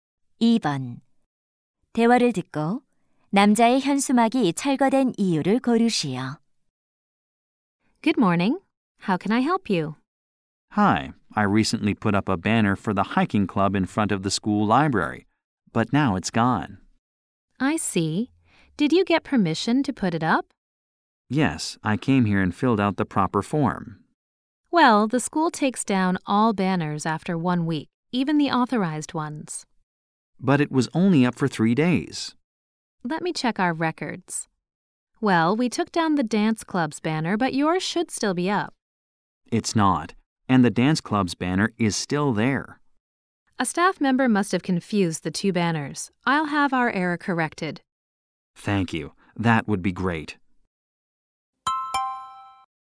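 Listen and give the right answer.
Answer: 직원이 댄스 동아리 현수막과 혼동해서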